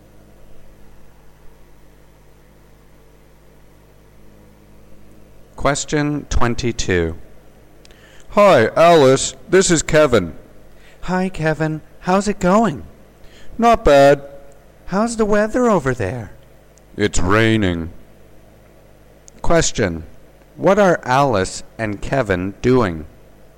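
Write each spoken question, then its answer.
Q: What are Alice and Kevin doing?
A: Talking on the phone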